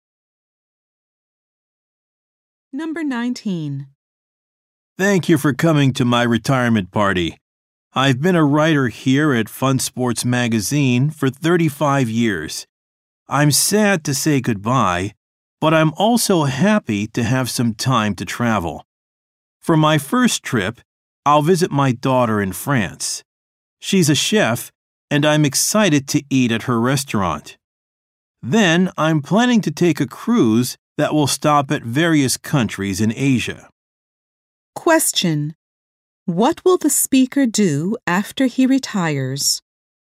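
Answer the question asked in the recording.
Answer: Visit his daughter in France and take a cruise in Asia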